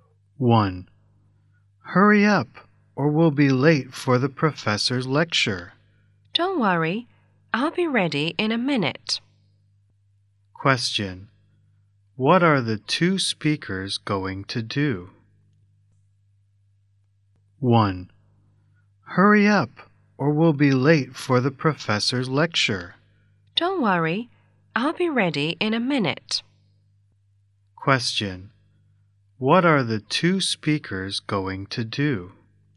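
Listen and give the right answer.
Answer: Attend the professor's lecture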